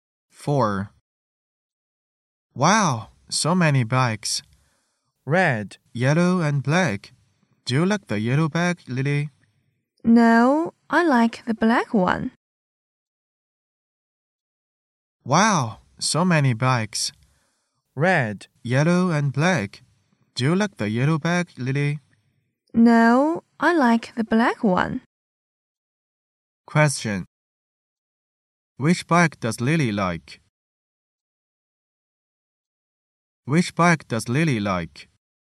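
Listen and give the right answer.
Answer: The black one.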